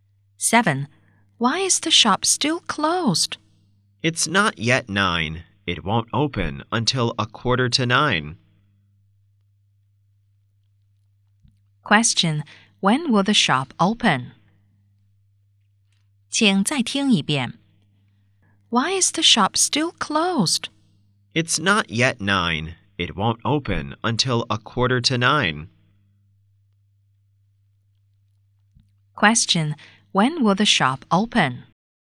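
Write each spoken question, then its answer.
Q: When will the shop open?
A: At 8:45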